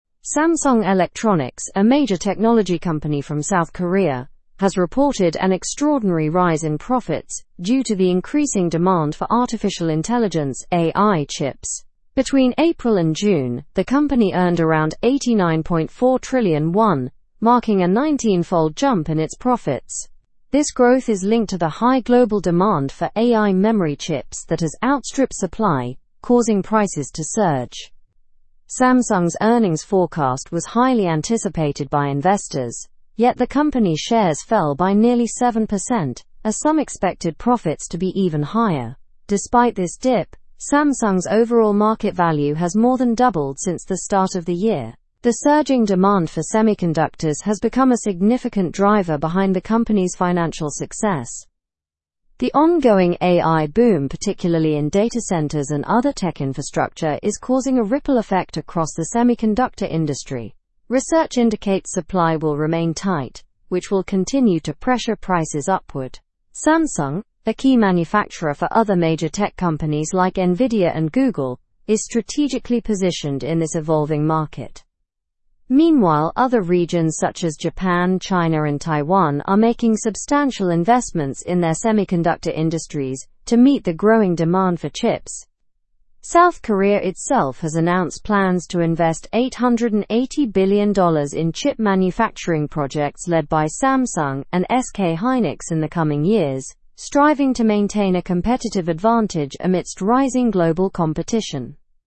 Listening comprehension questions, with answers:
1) What was the main reason for Samsung's increase in profits?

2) How much did Samsung earn between April and June?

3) What happened to Samsung's shares after the earnings report?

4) What is driving Samsung's financial success, according to the article?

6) Which other companies are mentioned as partners with Samsung?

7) How is South Korea planning to compete in the semiconductor industry?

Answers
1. The increasing demand for artificial intelligence chips.
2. Samsung earned around 89.4 trillion won.
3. The shares fell by nearly 7%.
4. The surging demand for semiconductors.
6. Nvidia and Google.
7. By investing $880 billion in chip manufacturing projects.

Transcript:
Samsung Electronics, a major technology company from South Korea, has reported an extraordinary rise in profits due to the increasing demand for artificial intelligence (AI) chips. Between April and June, the company earned around 89.4 trillion won, marking a 19-fold jump in its profits. This growth is linked to the high global demand for AI memory chips that has outstripped supply, causing prices to surge.
Samsung's earnings forecast was highly anticipated by investors, yet the company's shares fell by nearly 7% as some expected profits to be even higher. Despite this dip, Samsung's overall market value has more than doubled since the start of the year. The surging demand for semiconductors has become a significant driver behind the company's financial success.
The ongoing AI boom, particularly in data centers and other tech infrastructure, is causing a ripple effect across the semiconductor industry. Research indicates supply will remain tight, which will continue to pressure prices upward. Samsung, a key manufacturer for other major tech companies like Nvidia and Google, is strategically positioned in this evolving market.
Meanwhile, other regions such as Japan, China, and Taiwan are making substantial investments in their semiconductor industries to meet the growing demand for chips. South Korea itself has announced plans to invest $880 billion in chip manufacturing projects led by Samsung and SK Hynix in the coming years, striving to maintain a competitive advantage amidst rising global competition.

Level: Level 3